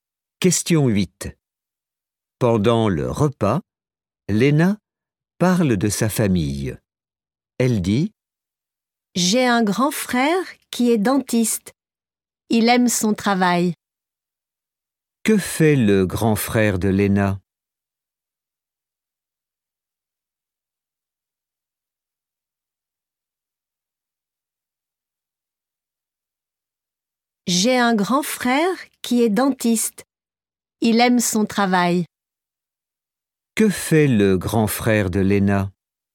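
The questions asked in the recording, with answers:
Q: Que fait le grand frère de Léna?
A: il est dentiste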